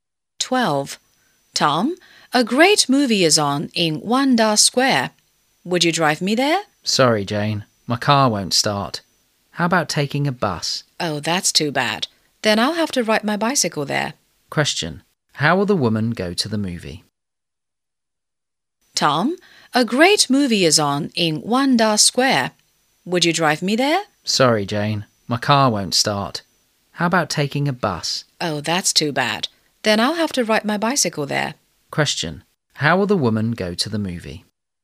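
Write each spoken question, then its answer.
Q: Question, how will the woman go to the movie?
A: By bicycle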